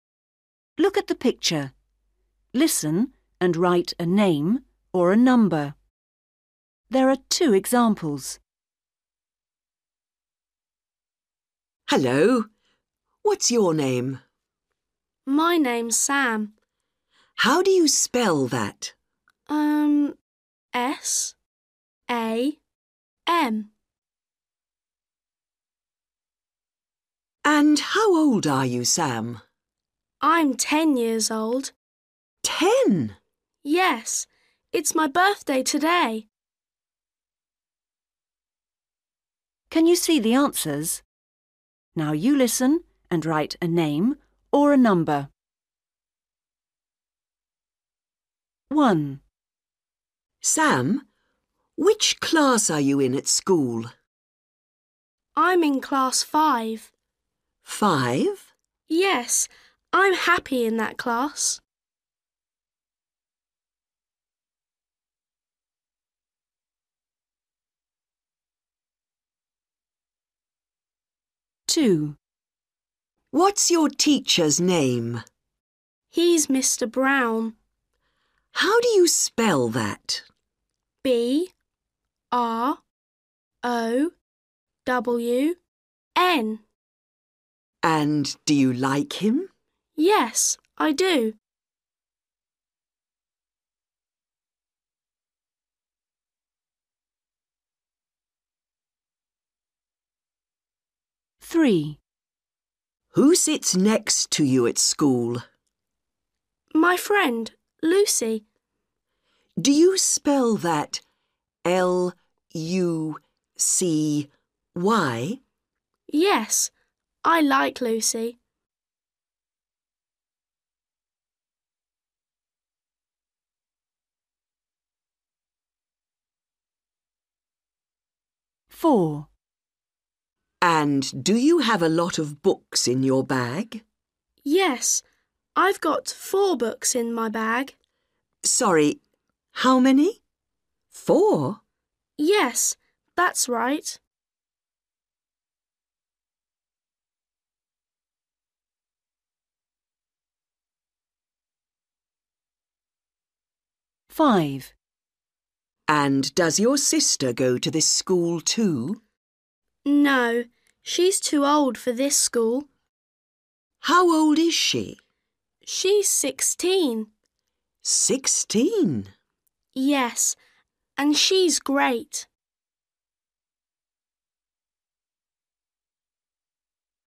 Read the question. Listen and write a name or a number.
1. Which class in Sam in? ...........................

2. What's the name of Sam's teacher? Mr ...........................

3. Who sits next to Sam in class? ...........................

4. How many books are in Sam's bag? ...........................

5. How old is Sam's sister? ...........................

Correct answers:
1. 5/five
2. Brown
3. Lucy
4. 4/four
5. 16/sixteen

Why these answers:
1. WOMAN: Sam, which class are you in at school? BOY: I'm in class five. WOMAN: Five? BOY: Yes. I'm happy in that class.
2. WOMAN: What's your teacher's name? BOY: He's Mr Brown. WOMAN: How do you spell that? BOY: B-R-O-W-N. WOMAN: And do you like him? BOY: Yes, I do.
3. WOMAN: Who sits next to you at school? BOY: My friend, Lucy. WOMAN: Do you spell that L-U-C-Y? BOY: Yes. I like Lucy.
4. WOMAN: And do you have a lot of books in your bag? BOY: Yes. I've got four books in my bag. WOMAN: Sorry ... how many? Four? BOY: Yes, that's right.
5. WOMAN: And does your sister go to this school too? BOY: No. She's too old for this school. WOMAN: How old is she? BOY: She's sixteen. WOMAN: Sixteen! BOY: Yes, and she's great.

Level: Starters